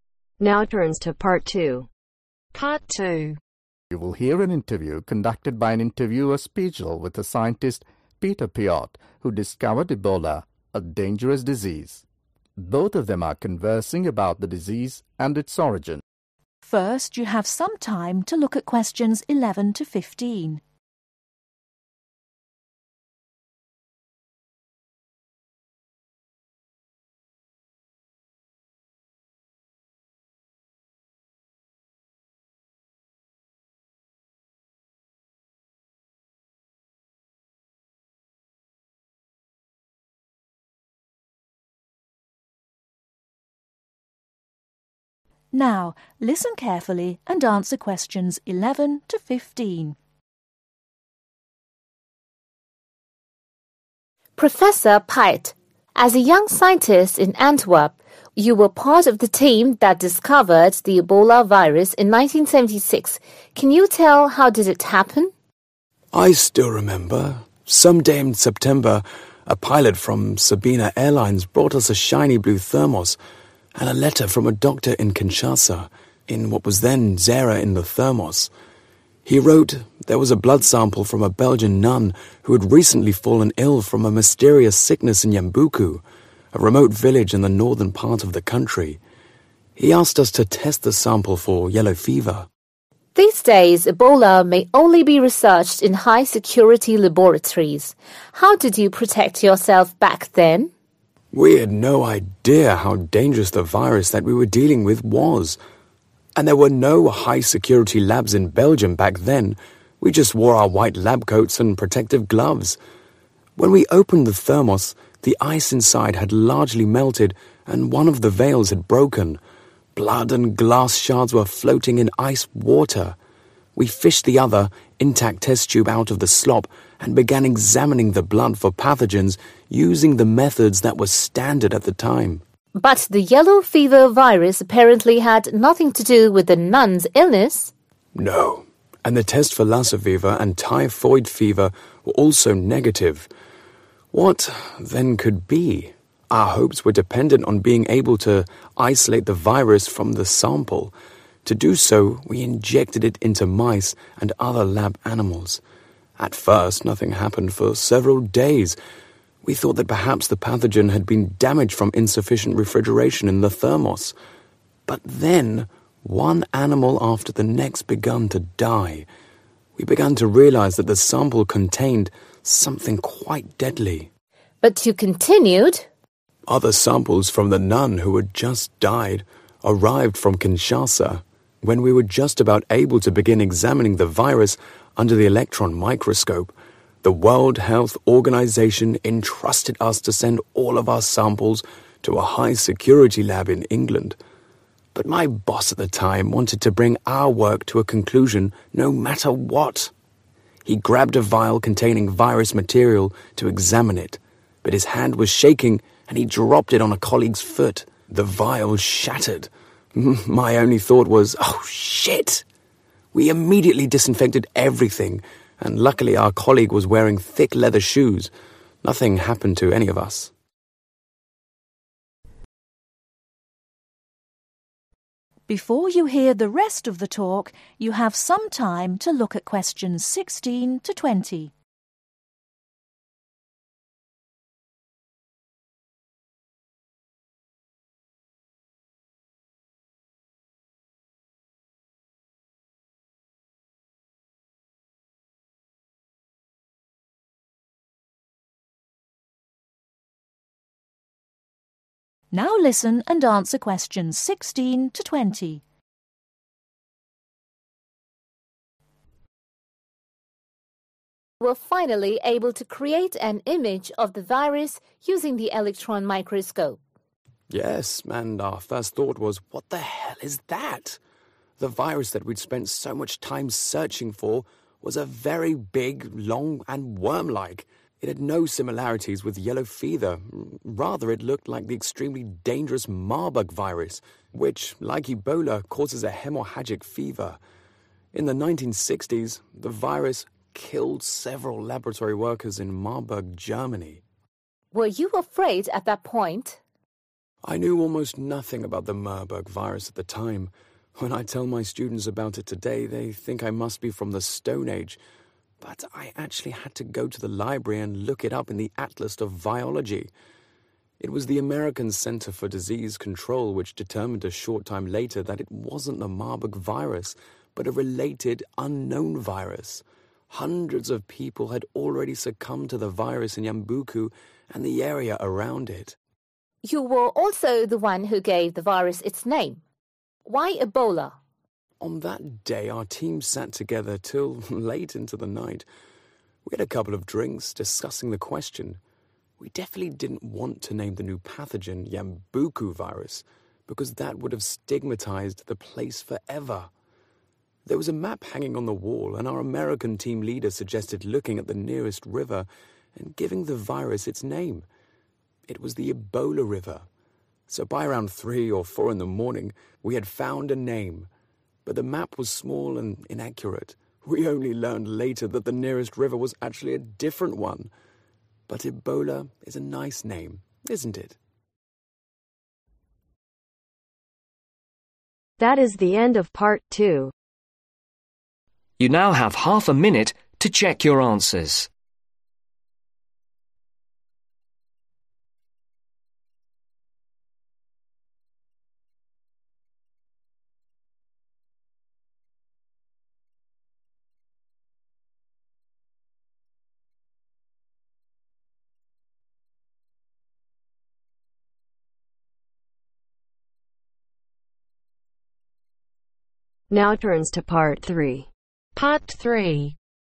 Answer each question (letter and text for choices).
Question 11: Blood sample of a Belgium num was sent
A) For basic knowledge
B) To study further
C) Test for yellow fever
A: C) Test for yellow fever

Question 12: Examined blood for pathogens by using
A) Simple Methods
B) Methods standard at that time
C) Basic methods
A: B) Methods standard at that time

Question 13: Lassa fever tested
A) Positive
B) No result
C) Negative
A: C) Negative

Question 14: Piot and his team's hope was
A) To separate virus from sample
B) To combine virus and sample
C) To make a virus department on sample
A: A) To separate virus from sample

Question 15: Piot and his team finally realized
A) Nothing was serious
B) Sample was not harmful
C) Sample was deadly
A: C) Sample was deadly

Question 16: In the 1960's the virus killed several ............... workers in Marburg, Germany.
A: Laboratory

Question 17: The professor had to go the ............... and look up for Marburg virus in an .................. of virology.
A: Library

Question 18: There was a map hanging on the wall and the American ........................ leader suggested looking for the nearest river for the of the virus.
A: Team

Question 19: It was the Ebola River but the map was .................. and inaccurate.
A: Small

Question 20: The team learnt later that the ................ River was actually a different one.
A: Nearest